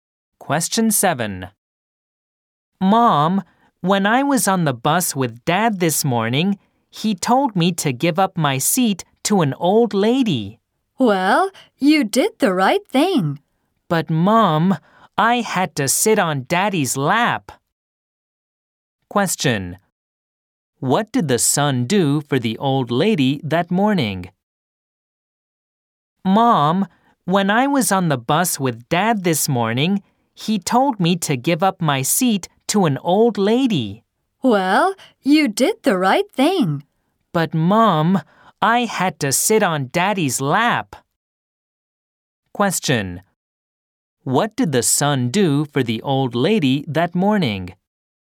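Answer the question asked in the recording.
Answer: He gave up his seat to her.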